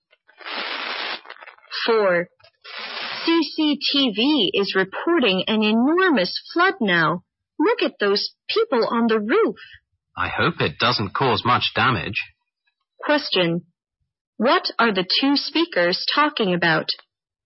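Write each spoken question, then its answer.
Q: What are the two speakers talking about?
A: A flood reported on TV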